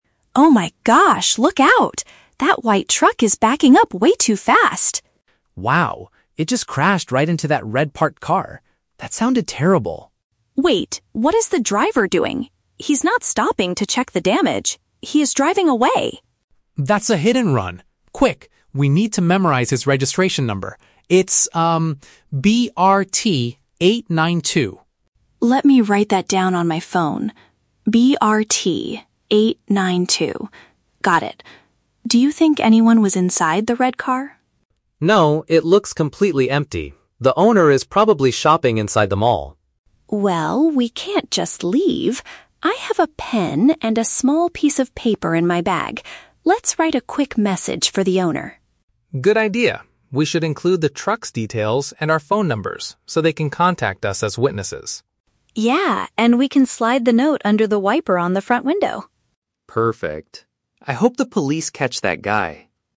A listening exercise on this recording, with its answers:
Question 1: What event did the two people just witness?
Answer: A driver crashing into an empty vehicle and leaving.

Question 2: Why does Jack tell Emma to act quickly?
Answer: To remember the letters and numbers on the truck.

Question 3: What will they do with the piece of paper?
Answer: Leave it on the glass of the damaged car.

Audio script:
Emma: Oh my gosh, look out! That white truck is backing up way too fast!
Jack: Wow! It just crashed right into that red parked car. That sounded terrible.
Emma: Wait, what is the driver doing? He's not stopping to check the damage. He is driving away!
Jack: That's a hit-and-run! Quick, we need to memorize his registration number. It's...
Emma: Let me write that down on my phone. Got it. Do you think anyone was inside the red car?
Jack: No, it looks completely empty. The owner is probably shopping inside the mall.
Emma: Well, we can't just leave. I have a pen and a small piece of paper in my bag. Let's write a quick message for the owner.
Jack: Good idea. We should include the truck's details and our phone numbers so they can contact us as witnesses.
Emma: Yeah, and we can slide the note under the wiper on the front window.